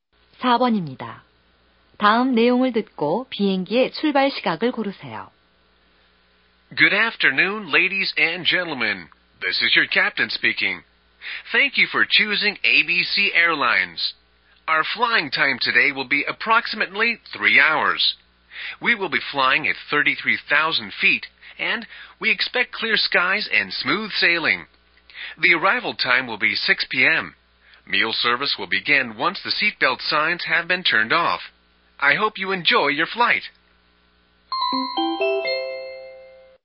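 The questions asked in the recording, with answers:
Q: 다음 내용을 듣고 비행기의 출발 시각을 고르세요.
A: 오후 3시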